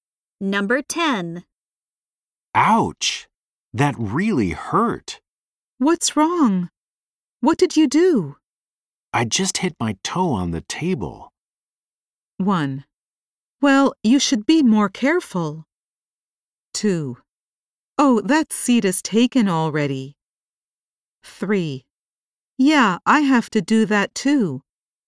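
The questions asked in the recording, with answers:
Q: I just hit my toe on the table.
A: 1: Well, you should be more careful.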